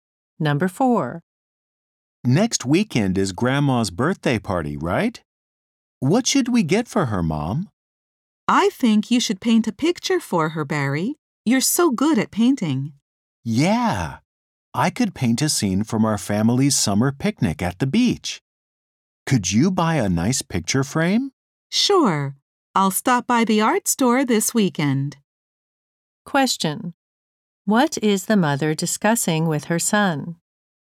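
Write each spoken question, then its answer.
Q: What is the mother discussing with her son?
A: A present for Grandma's birthday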